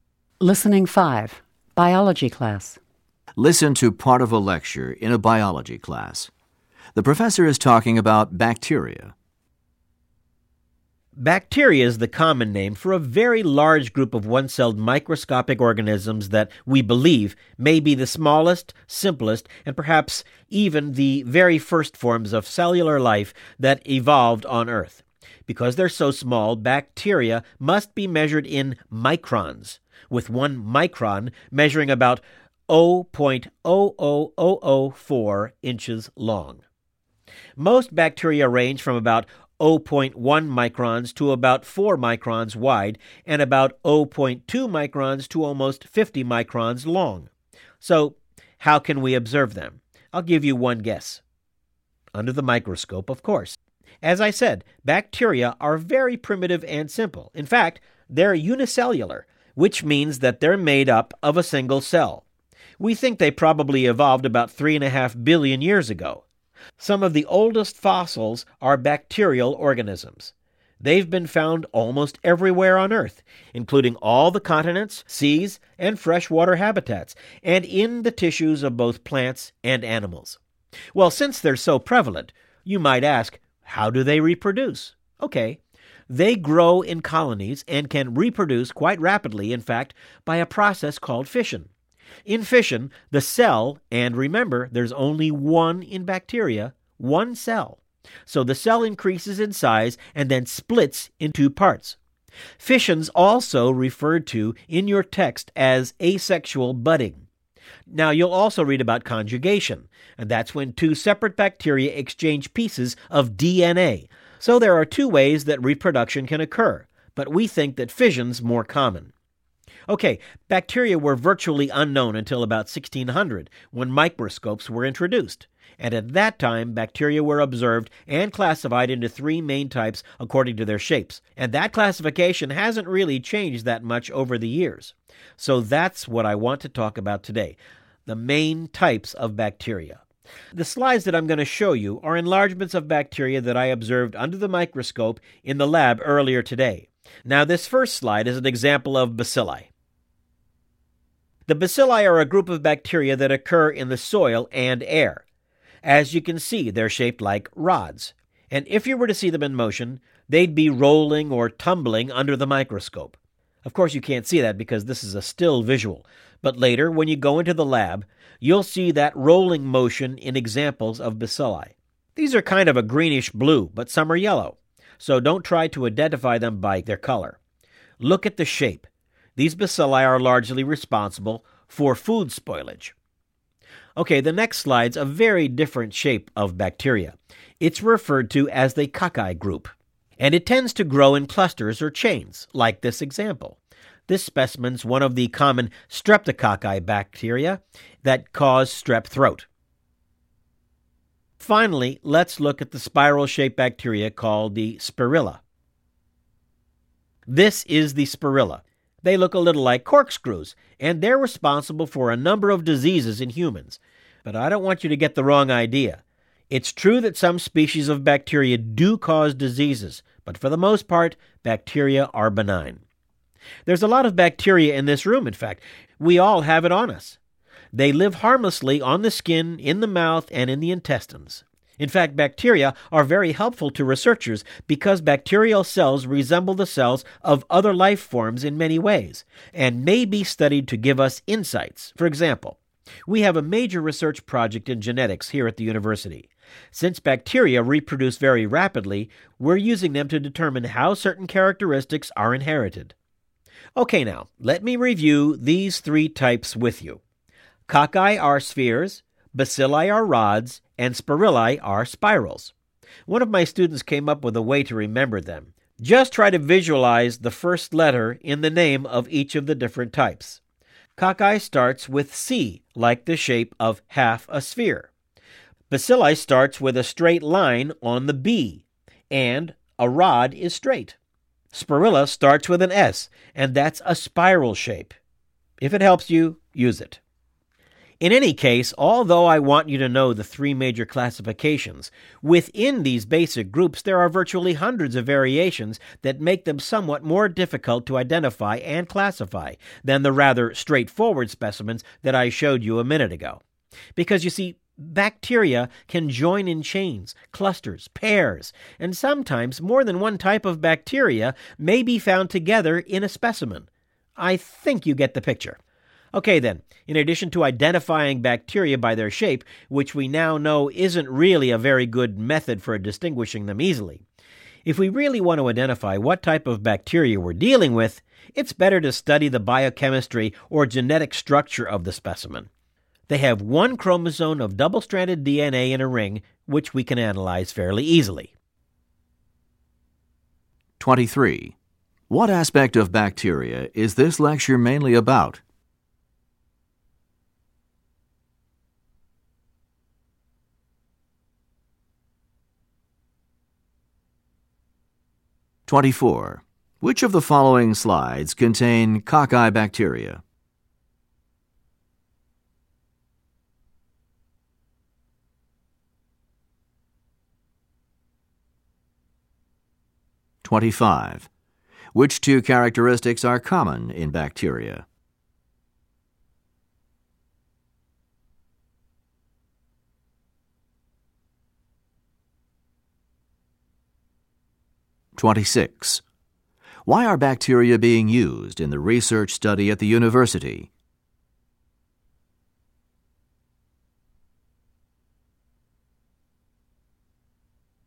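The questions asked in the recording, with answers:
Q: What aspect of bacteria is this lecture mainly about?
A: The main types of bacteria, classified by shape

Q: Why are bacteria being used in the research study at the university?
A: They reproduce very rapidly, so they show how characteristics are inherited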